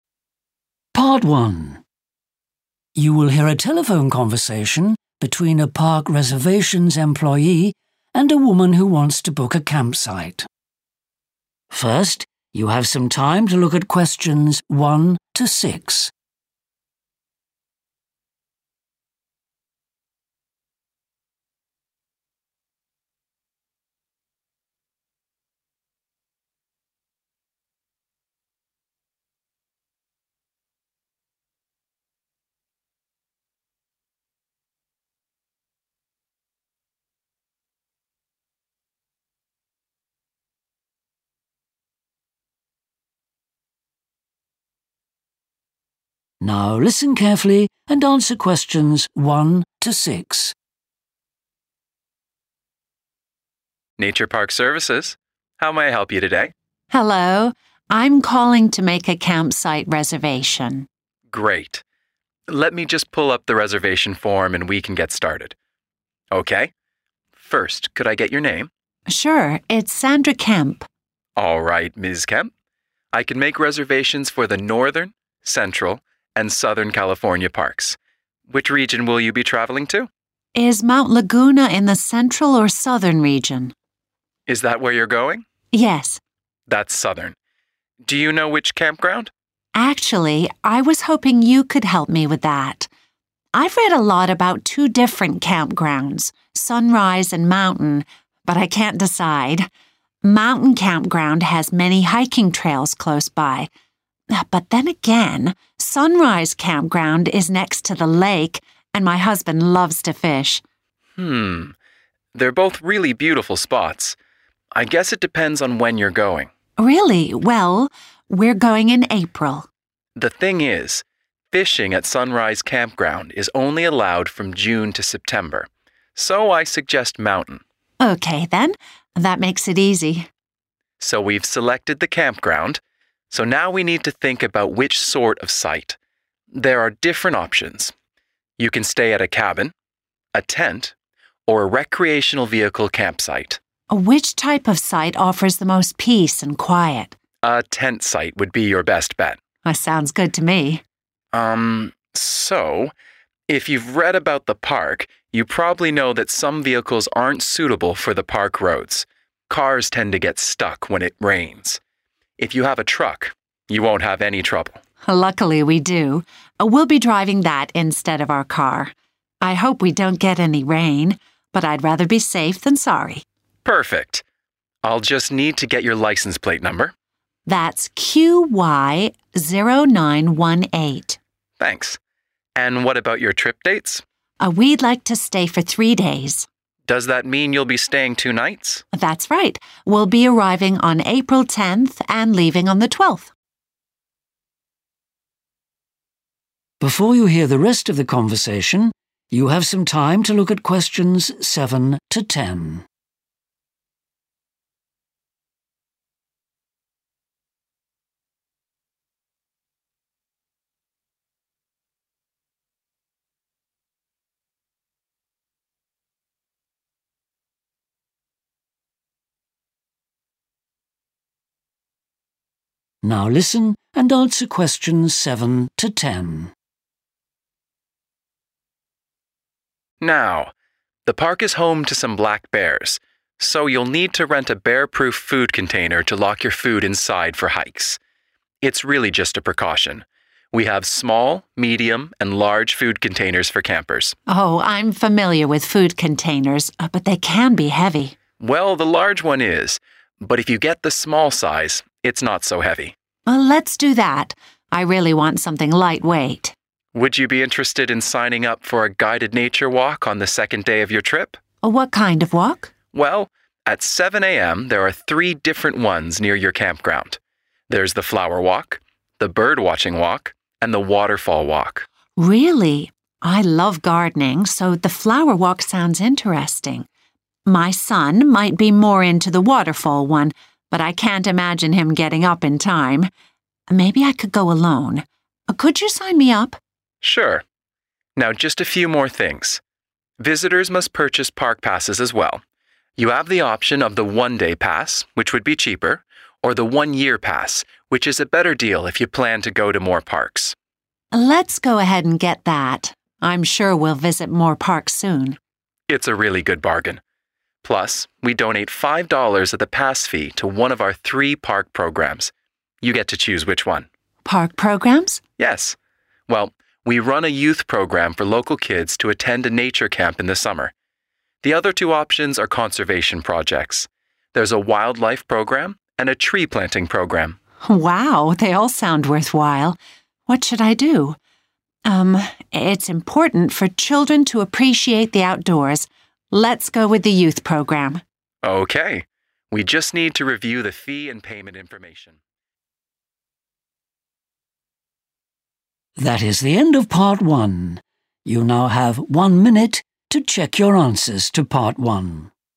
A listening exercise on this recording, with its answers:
Complete the form below. Write ONE WORD AND/OR A NUMBER for each answer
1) Park region: 1............... California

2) Campground name: 2............... Campground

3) Type of site: 3...............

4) Type of vehicle: will be driving a 4...............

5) Licence plate number: 5...............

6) Departure date: 6...............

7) Bear-proof food container: size required: 7...............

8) Type of nature walk booked: the 8............... walk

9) Type of park pass: the 9............... pass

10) Donation programme selection: the 10............... programme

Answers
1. Southern
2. Mountain
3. tent
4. truck
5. QY0918
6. April 12/12 April/12th April
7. small
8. flower
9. one-year/one year
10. youth